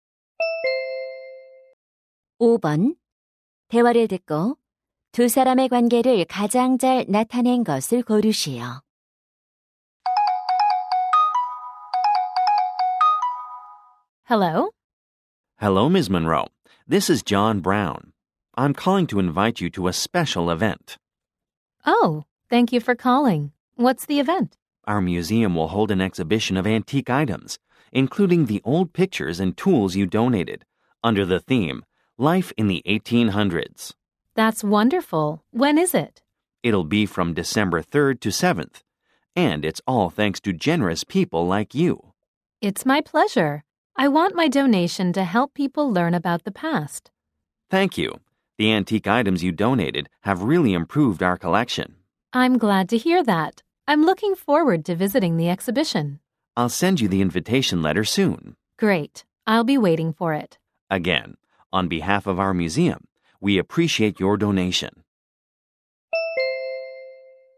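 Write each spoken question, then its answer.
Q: 대화를 듣고 두 사람의 관계를 가장 잘 나타낸 것을 고르시오.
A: 박물관 직원 - 유물 기증자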